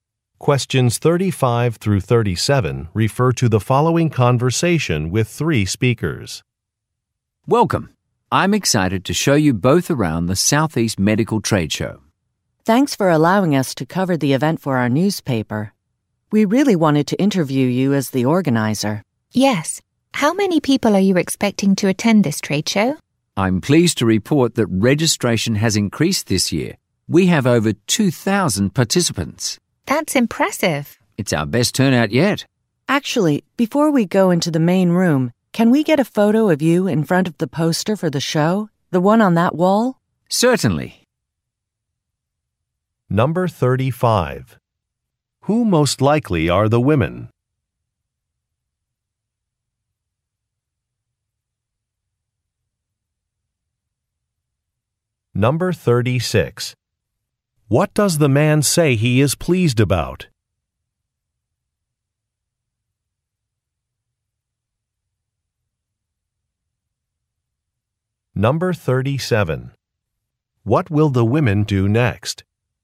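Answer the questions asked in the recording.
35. Newspaper reporters
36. Registration has increased
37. Take a photo of him in front of the poster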